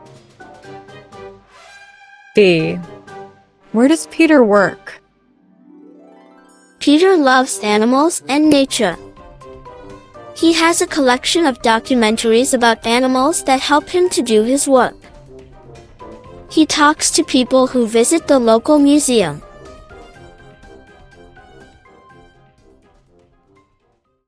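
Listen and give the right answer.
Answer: In the local museum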